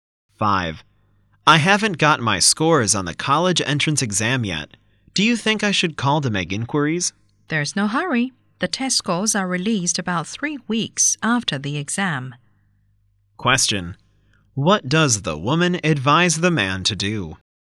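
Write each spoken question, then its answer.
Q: What does the woman advise the man to do?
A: Wait for the scores; no need to call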